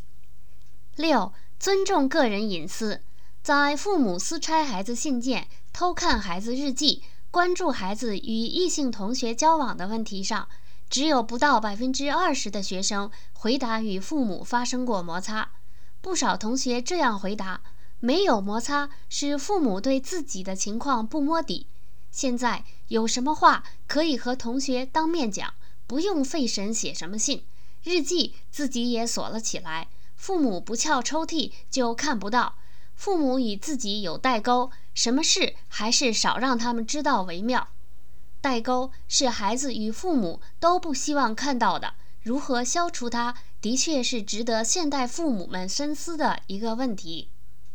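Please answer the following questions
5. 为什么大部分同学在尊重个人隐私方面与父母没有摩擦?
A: 因为父母对自己的情况不摸底:有话当面和同学讲,不写信,日记锁起来,什么事少让父母知道。

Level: 3rd Year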